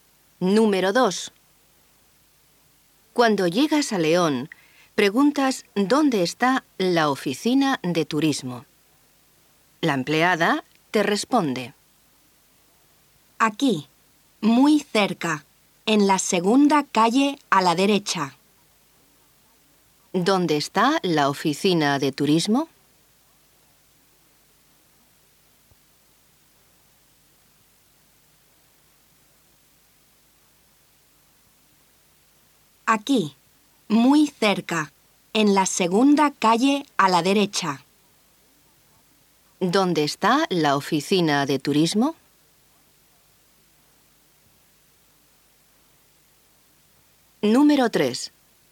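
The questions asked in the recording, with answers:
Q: ¿Dónde está la oficina de turismo?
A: Muy cerca, en la segunda calle a la derecha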